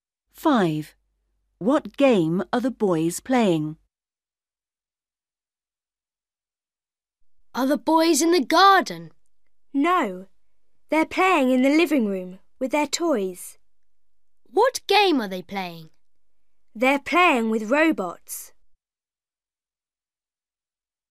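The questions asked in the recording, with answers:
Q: What game are the boys playing?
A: They're playing with robots.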